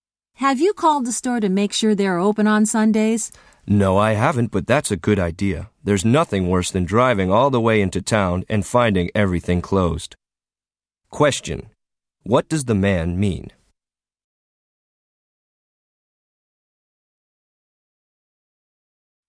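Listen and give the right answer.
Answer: He hasn't called the store yet, but he thinks calling is a good idea.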